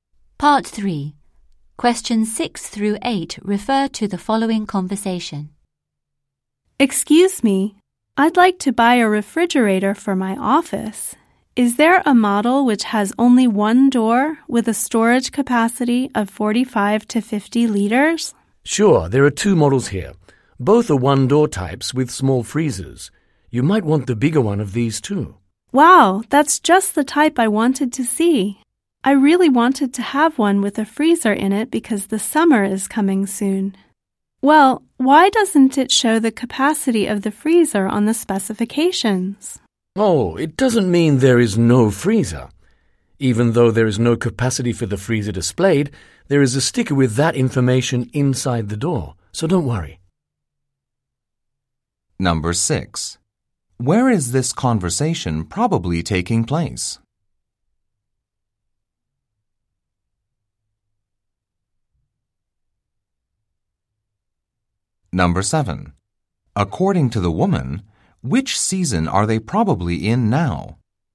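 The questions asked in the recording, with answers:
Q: Where is this conversation probably taking place?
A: In an appliance store

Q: According to the woman, which season are they probably in now?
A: Spring (summer is coming soon)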